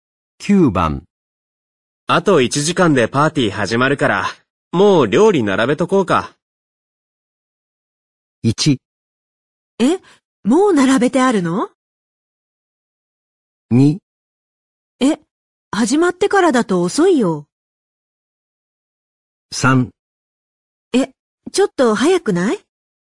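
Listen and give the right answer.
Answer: 3: え、ちょっと早くない?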